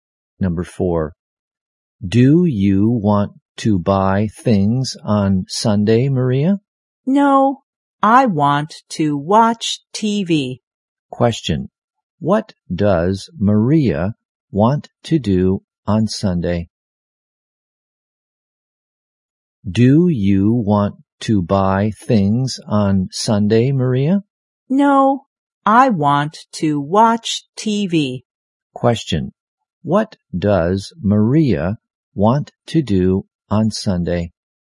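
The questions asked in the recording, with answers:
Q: what does Maria want to do on Sunday?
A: Watch TV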